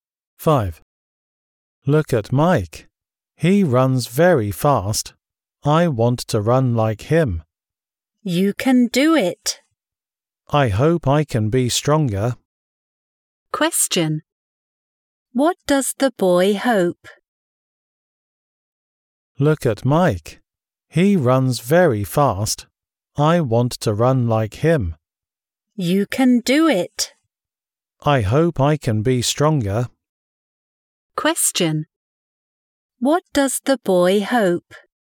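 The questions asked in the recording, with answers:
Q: What does the boy hope?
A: He hopes he can be stronger.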